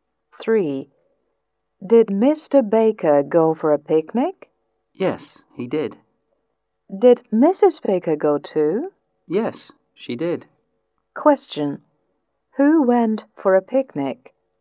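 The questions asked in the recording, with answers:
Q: Who went for a picnic?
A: Mr. and Mrs. Baker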